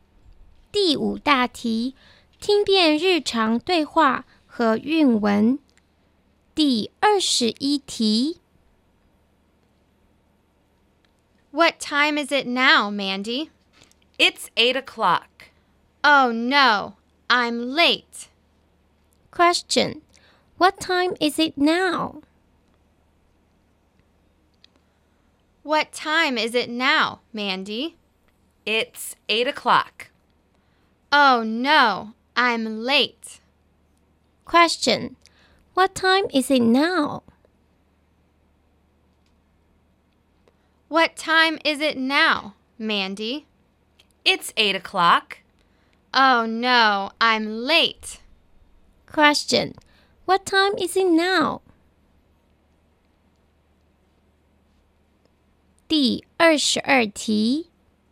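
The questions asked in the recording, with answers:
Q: Question, what time is it now?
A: It's 8 o'clock.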